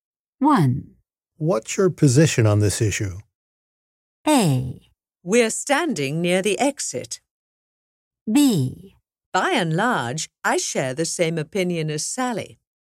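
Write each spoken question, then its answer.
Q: What's your position on this issue?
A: B: By and large, I share the same opinion as Sally.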